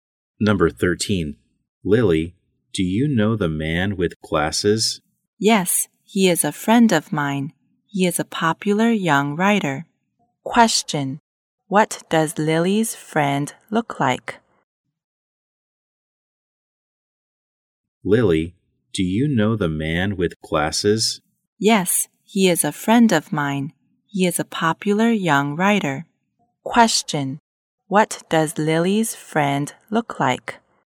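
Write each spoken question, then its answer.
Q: Question: What does Lily's friend look like?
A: He wears glasses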